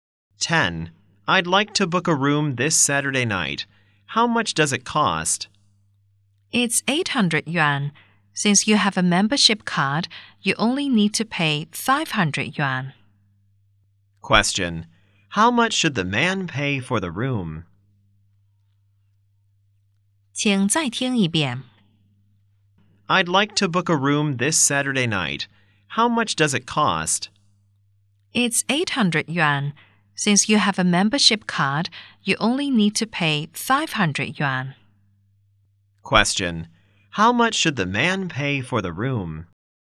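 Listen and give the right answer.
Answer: 500 yuan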